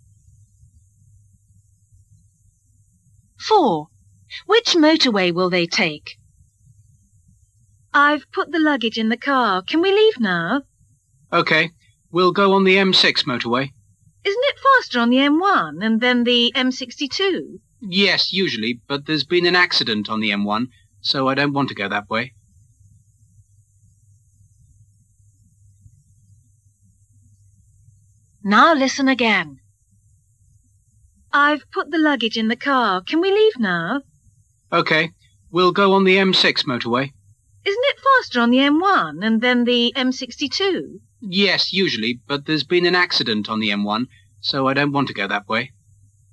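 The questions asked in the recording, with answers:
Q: Which motorway will they take?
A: The M6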